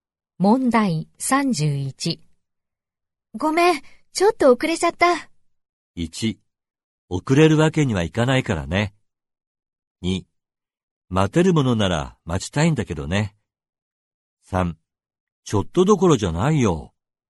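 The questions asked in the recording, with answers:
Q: ごめん、ちょっと遅れちゃった。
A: 3: ちょっとどころじゃないよ。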